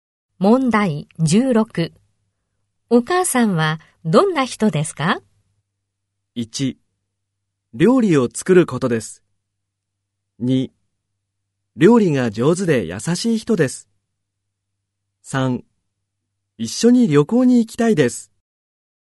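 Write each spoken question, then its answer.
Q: お母さんはどんな人ですか?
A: 2: 料理が上手で優しい人です。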